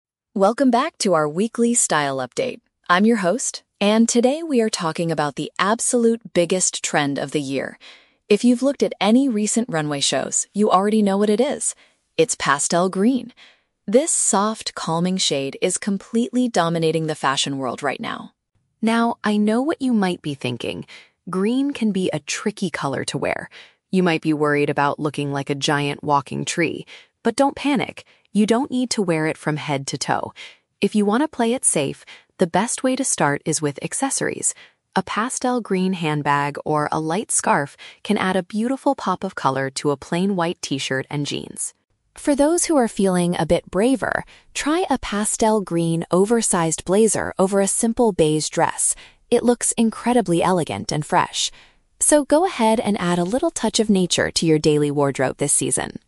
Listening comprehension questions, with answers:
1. What is the main focus of today's style update?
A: A specific soft color that is currently very popular.

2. What is the editor's advice for people who are nervous about trying this trend?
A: Begin by using small extra items like bags.

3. How does the editor suggest styling the oversized blazer?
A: Wearing it together with a simple light brown outfit.

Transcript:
Editor: Welcome back to our weekly style update. I'm your host, and today we are talking about the absolute biggest trend of the year. If you've looked at any recent runway shows, you already know what it is. It's pastel green! This soft, calming shade is completely dominating the fashion world right now.
Now, I know what you might be thinking. Green can be a tricky color to wear. You might be worried about looking like a giant walking tree. But don't panic! You don't need to wear it from head to toe. If you want to play it safe, the best way to start is with accessories. A pastel green handbag or a light scarf can add a beautiful pop of color to a plain white t-shirt and jeans.
For those who are feeling a bit braver, try a pastel green oversized blazer over a simple beige dress. It looks incredibly elegant and fresh. So, go ahead and add a little touch of nature to your daily wardrobe this season!